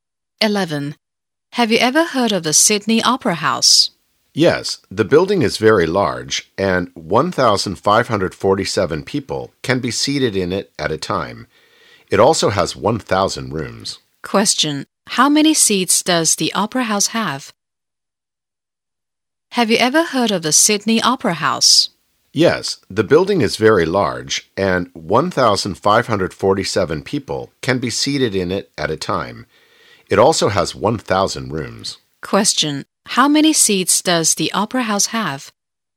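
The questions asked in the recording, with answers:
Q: How many seats does the opera house have?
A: 1,547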